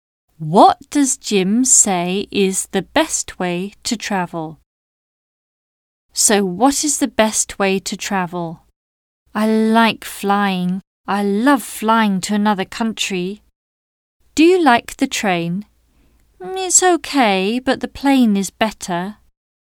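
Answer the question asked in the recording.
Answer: Flying (by plane)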